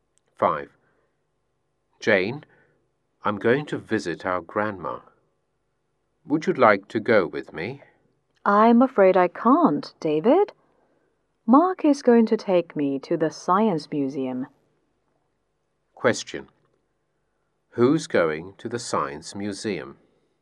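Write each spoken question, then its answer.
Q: Who's going to the Science Museum?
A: Jane and Mark.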